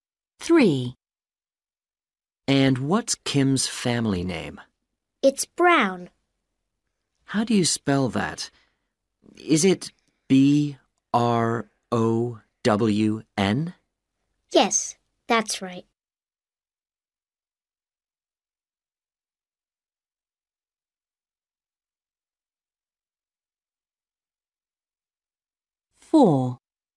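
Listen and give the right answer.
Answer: Brown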